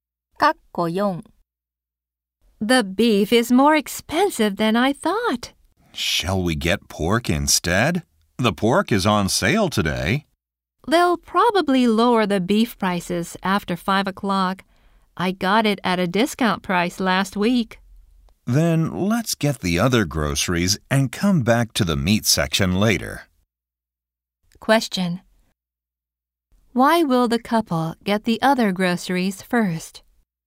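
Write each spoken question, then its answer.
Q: Why will the couple get the other groceries first?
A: The beef prices will probably be lowered after 5 o'clock.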